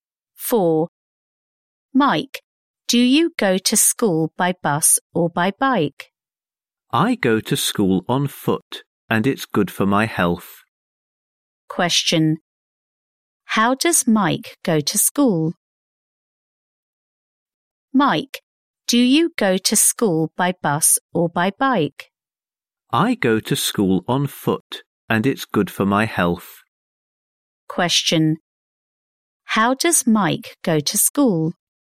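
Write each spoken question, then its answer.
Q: How does Mike go to school?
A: On foot.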